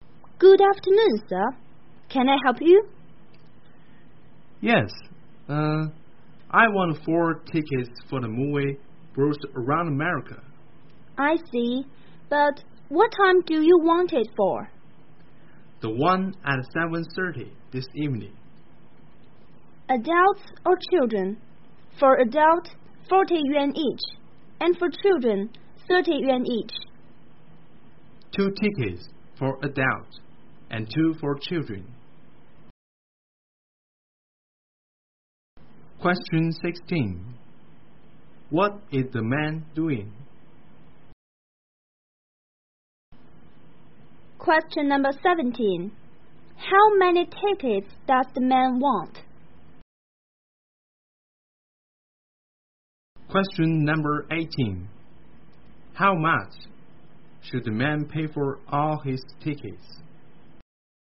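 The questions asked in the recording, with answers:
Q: What is the man doing?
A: Buying movie tickets

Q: How many tickets does the man want?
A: Four

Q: How much should the man pay for all his tickets?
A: 140 yuan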